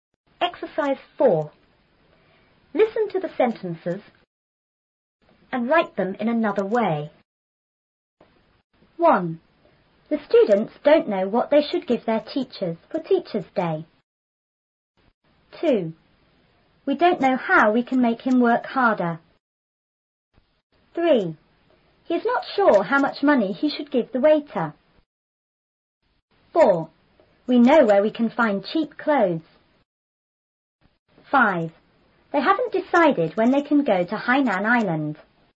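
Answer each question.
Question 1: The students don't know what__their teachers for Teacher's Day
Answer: to give

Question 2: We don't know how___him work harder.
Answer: to make

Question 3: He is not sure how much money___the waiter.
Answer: to give

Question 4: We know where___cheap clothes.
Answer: to find

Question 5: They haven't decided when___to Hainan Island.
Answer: to go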